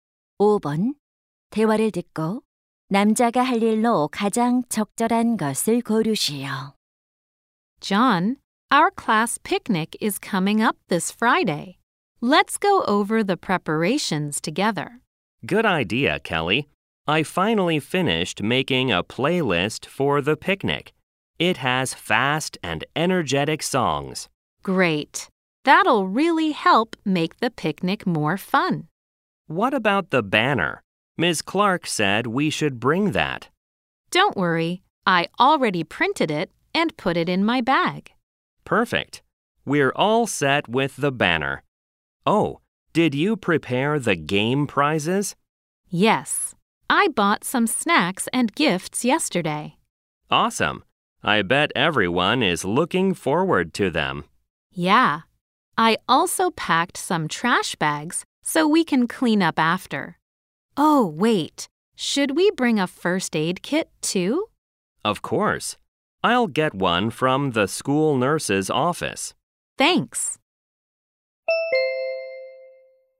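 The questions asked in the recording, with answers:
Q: 대화를 듣고 남자가 할 일로 가장 적절한 것을 고르시오.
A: 보건실에서 구급상자 가져오기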